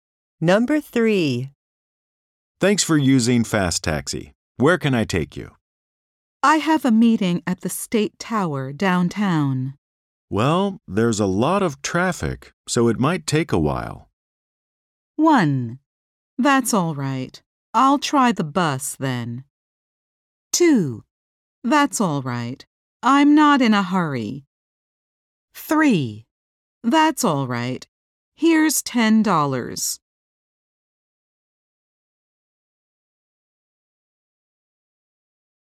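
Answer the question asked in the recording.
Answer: That's all right. I'm not in a hurry.

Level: 英検準2級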